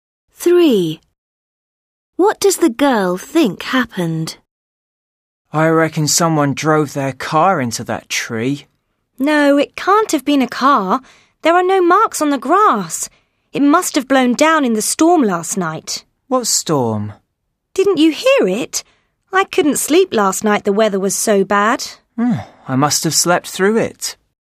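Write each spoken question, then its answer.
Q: What does the girl think happened?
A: The tree blew down in the storm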